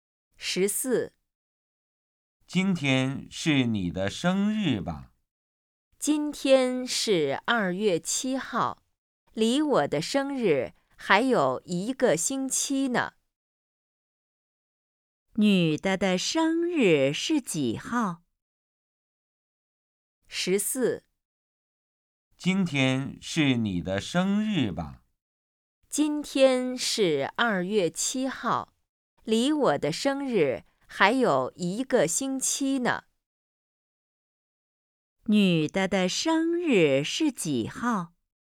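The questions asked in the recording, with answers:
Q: 女的的生日是几号?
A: 2月14号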